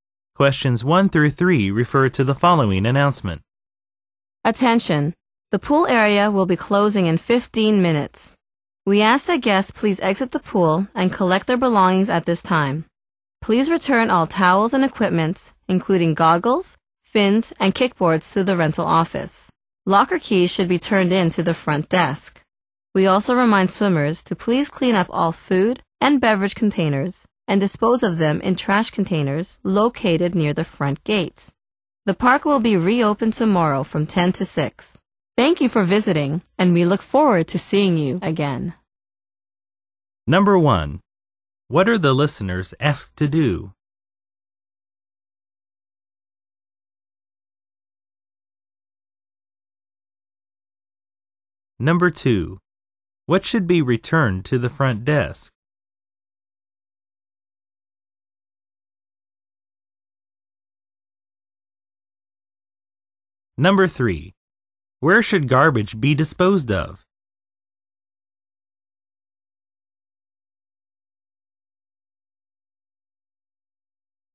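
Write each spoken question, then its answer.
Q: What should be returned to the front desk?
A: Locker keys

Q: Where should garbage be disposed of?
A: In trash containers near the front gate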